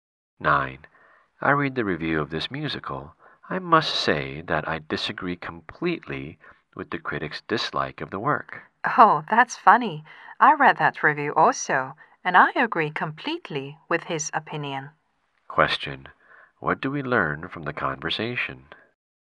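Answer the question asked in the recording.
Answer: They have different opinions of the review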